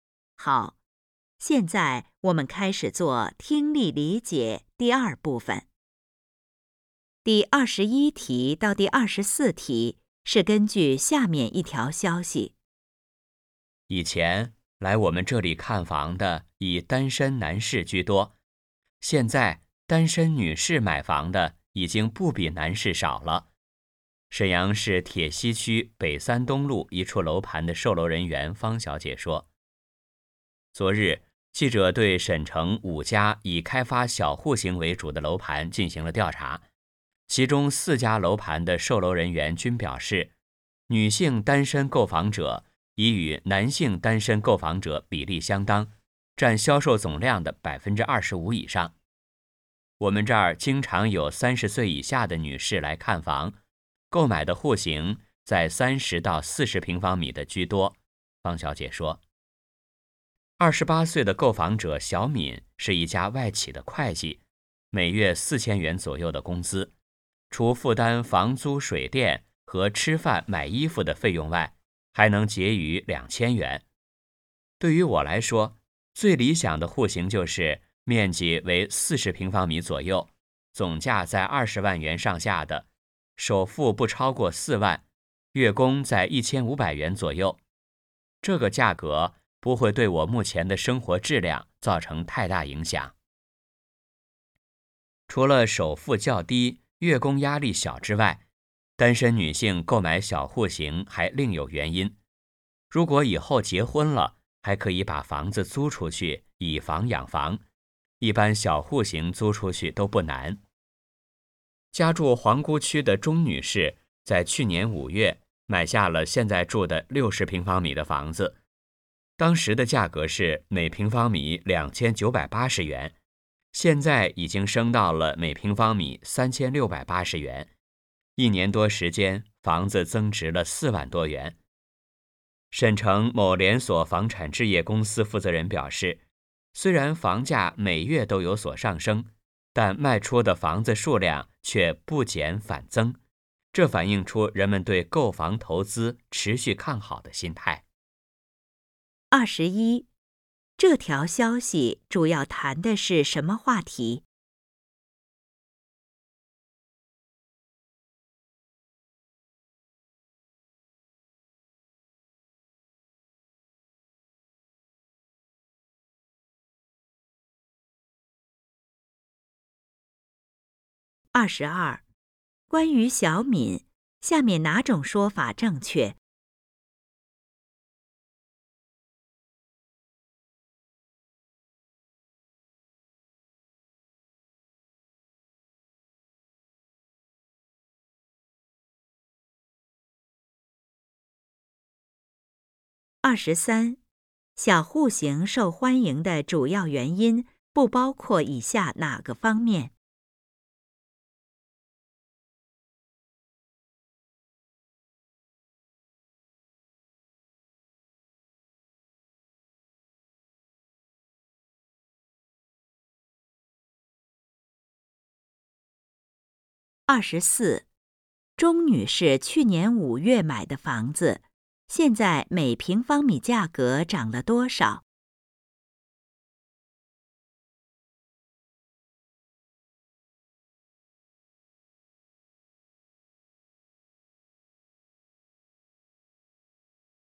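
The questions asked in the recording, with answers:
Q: 钟女士去年5月买的房子,现在每平方米价格涨了多少?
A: 700元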